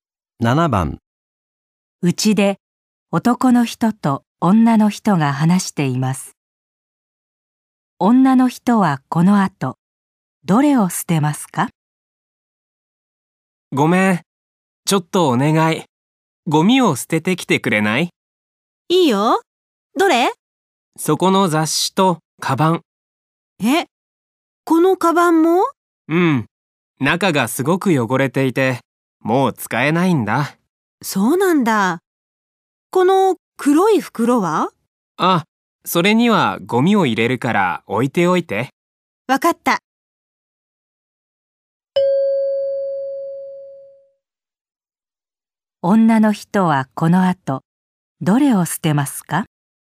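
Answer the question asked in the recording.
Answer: 雑誌とカバン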